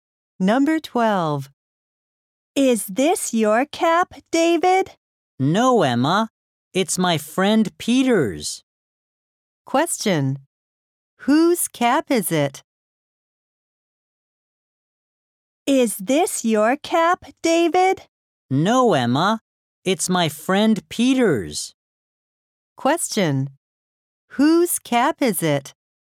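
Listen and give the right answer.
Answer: Peter's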